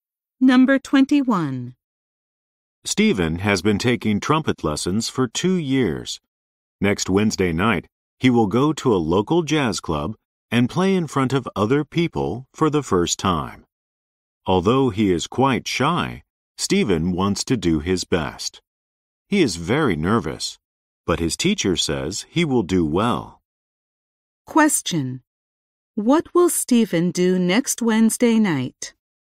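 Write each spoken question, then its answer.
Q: What will Stephen do next Wednesday night?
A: Play the trumpet in public at a jazz club for the first time.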